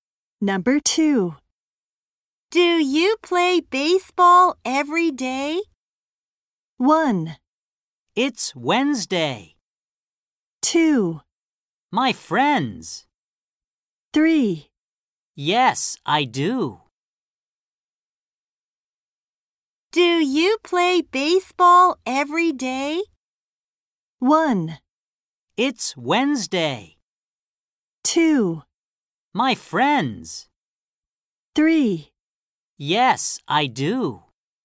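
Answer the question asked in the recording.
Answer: 3: Yes, I do.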